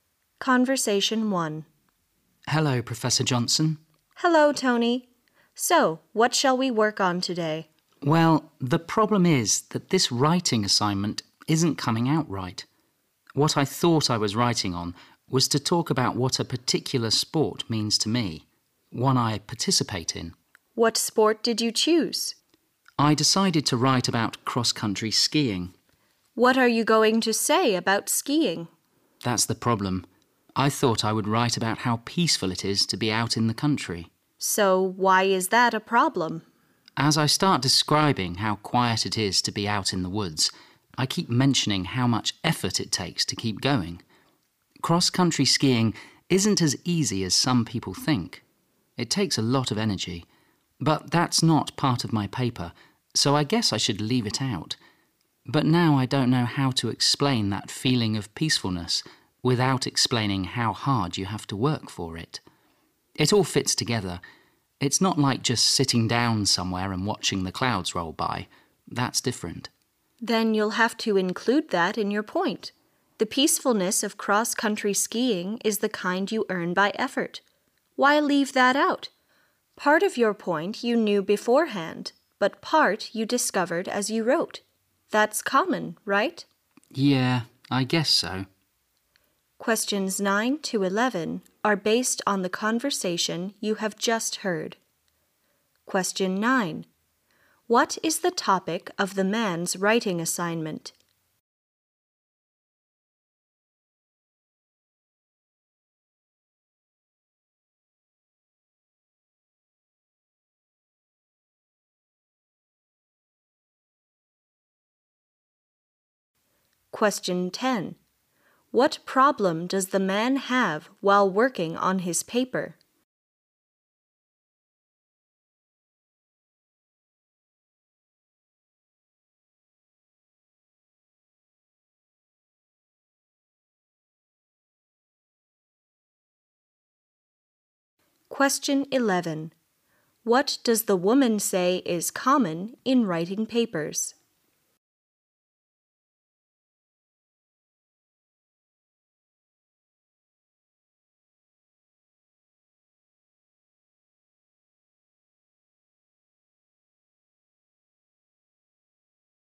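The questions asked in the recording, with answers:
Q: What is the topic of the man's writing assignment?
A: What cross-country skiing means to him

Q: What problem does the man have while working on his paper?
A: He can't describe the peacefulness without mentioning the effort it takes, which he thought didn't belong in the paper

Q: What does the woman say is common in writing papers?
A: Discovering part of your point while writing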